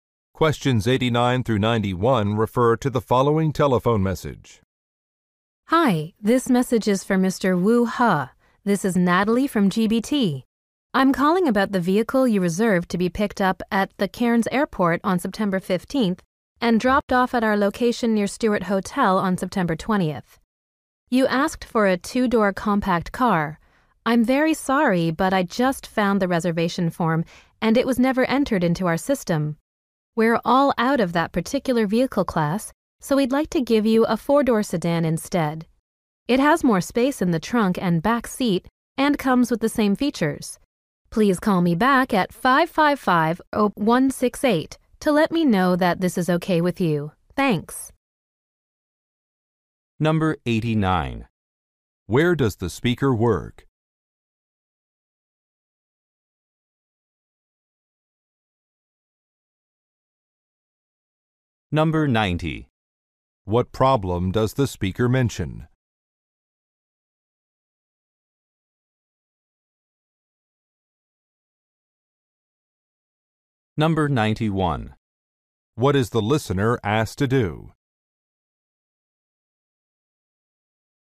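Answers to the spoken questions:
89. At a car rental company
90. A reservation was not entered into the system
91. Call back to approve the change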